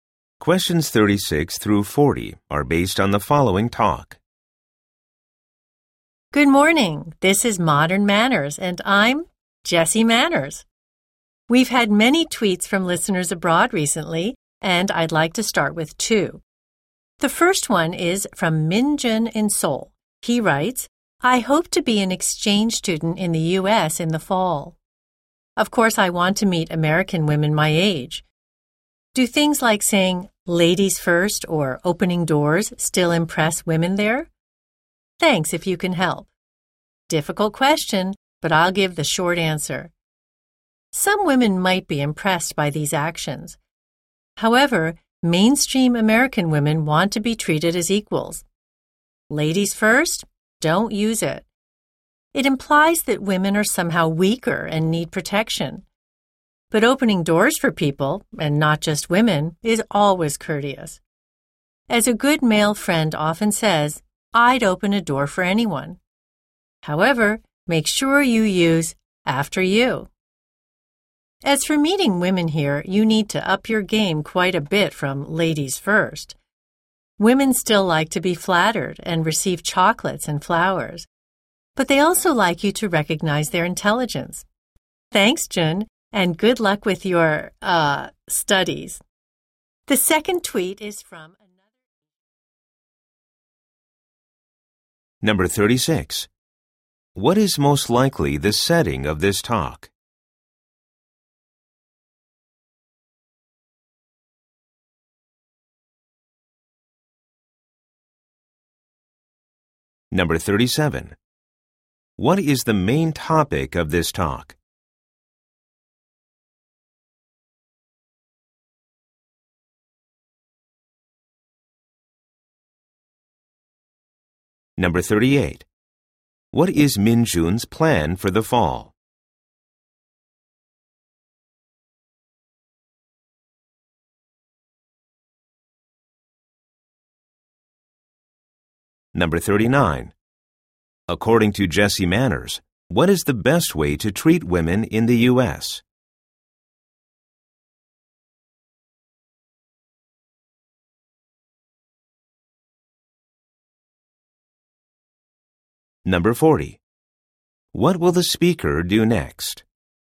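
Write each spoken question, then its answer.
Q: What is most likely the setting of this talk?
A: A radio program

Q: What is Minjun's plan for the fall?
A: To be an exchange student in the U.S.

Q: What will the speaker do next?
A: Read the second tweet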